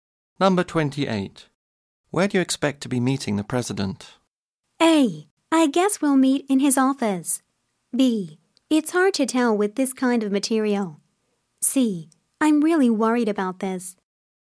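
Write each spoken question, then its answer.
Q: Where do you expect to be meeting the president?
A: A: I guess we'll meet in his office.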